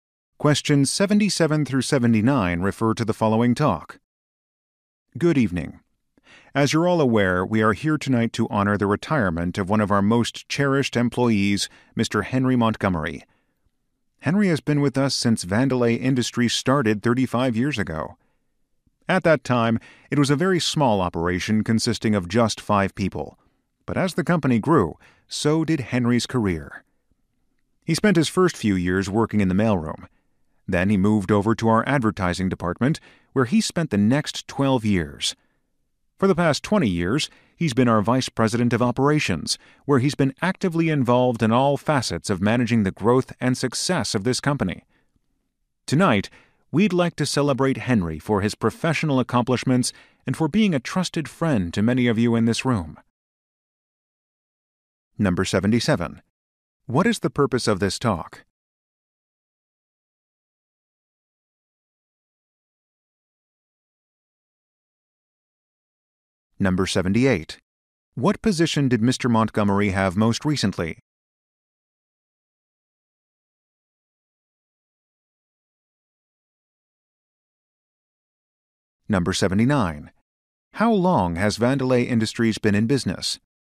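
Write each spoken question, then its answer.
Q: What is the purpose of this talk?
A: To honor an employee's retirement

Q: What position did Mr. Montgomery have most recently?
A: Vice president of operations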